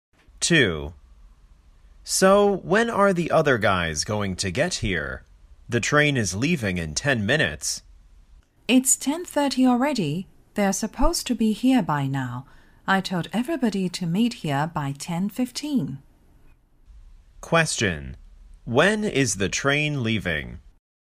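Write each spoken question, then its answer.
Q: When is the train leaving?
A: At 10:40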